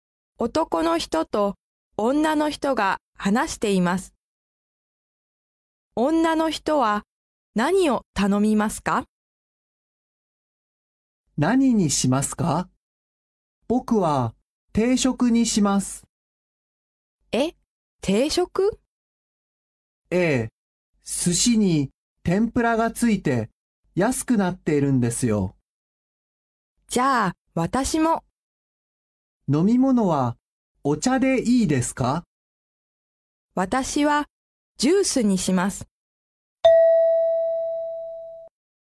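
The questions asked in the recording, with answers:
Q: 女の人は何を頼みますか?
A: 定食とジュース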